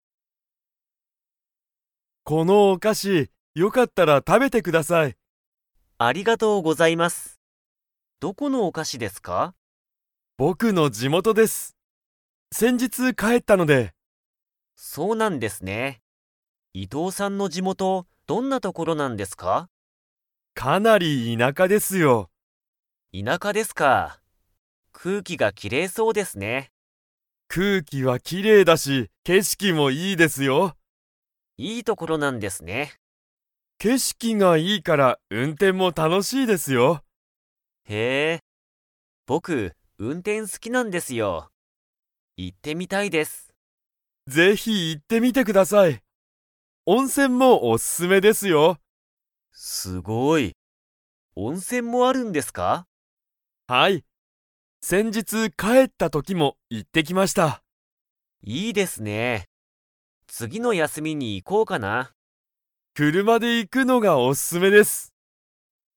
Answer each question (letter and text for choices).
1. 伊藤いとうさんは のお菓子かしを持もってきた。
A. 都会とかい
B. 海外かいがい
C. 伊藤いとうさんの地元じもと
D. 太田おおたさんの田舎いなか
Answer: C. 伊藤いとうさんの地元じもと

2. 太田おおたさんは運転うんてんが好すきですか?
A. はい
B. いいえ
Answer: A. はい

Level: Level 4